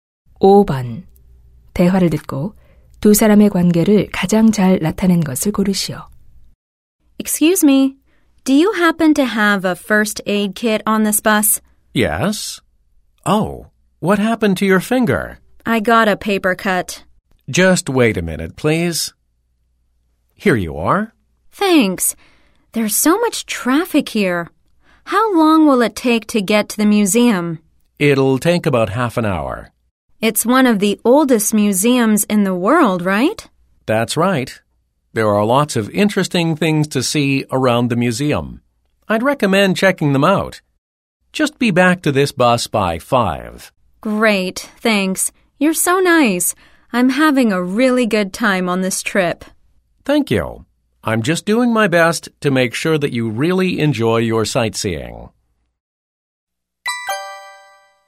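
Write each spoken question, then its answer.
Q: 대화를 듣고 두 사람의 관계를 가장 잘 나타낸 것을 고르시오.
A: 관광객 - 여행 가이드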